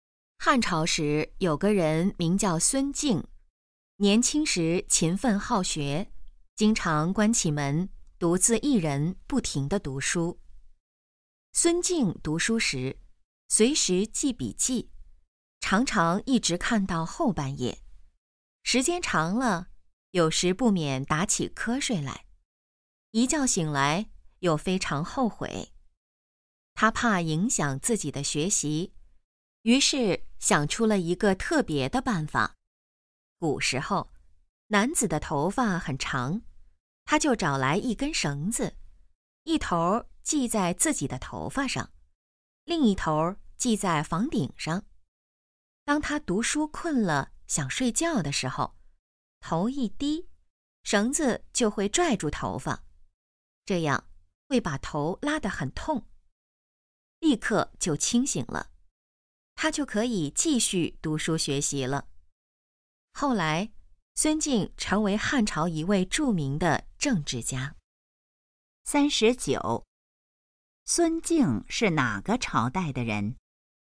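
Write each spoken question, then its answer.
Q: 孙敬是哪个朝代的人?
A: 汉朝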